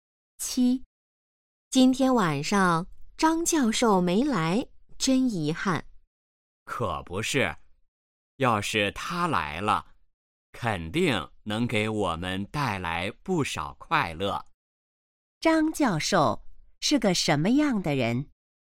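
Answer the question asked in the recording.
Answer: 很幽默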